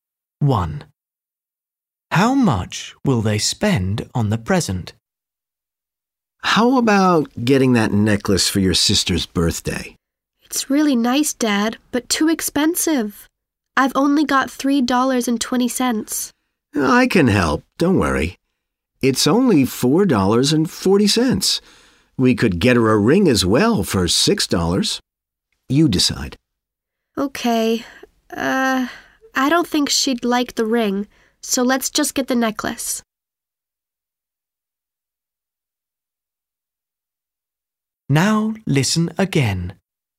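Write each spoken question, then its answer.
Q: How much will they spend on the present?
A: $4.40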